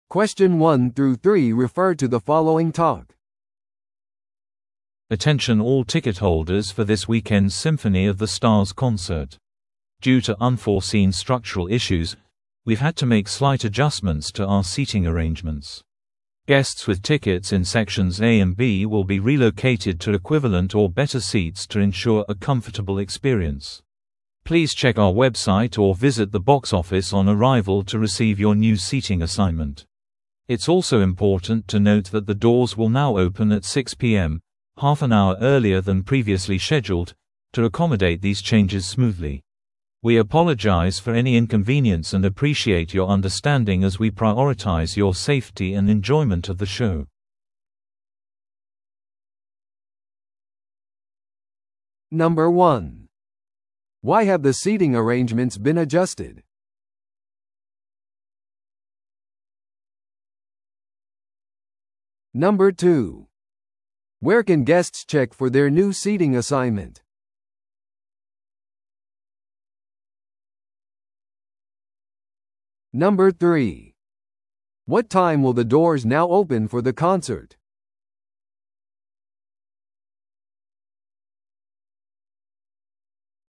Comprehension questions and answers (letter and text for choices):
Listen to the audio below and answer the questions.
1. Why have the seating arrangements been adjusted?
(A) コンサートが再スケジュールされたため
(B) さらにチケットが売れたため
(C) 構造上の問題があるため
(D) 出演バンドのリクエストがあったため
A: (C) 構造上の問題があるため

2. Where can guests check for their new seating assignment?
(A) コンサートのプログラムで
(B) ボックスオフィスまたはウェブサイトで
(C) カスタマーサービスに電話して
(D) メール確認で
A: (B) ボックスオフィスまたはウェブサイトで

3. What time will the doors now open for the concert?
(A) 5:30pm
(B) 6:00pm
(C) 6:30pm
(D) 7:00pm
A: (B) 6:00pm

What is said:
Attention all ticket holders for this weekend's Symphony of the Stars concert. Due to unforeseen structural issues, we've had to make slight adjustments to our seating arrangements. Guests with tickets in sections A and B will be relocated to equivalent or better seats to ensure a comfortable experience. Please check our website or visit the box office on arrival to receive your new seating assignment. It's also important to note that the doors will now open at 6pm, half an hour earlier than previously scheduled, to accommodate these changes smoothly. We apologize for any inconvenience and appreciate your understanding as we prioritize your safety and enjoyment of the show.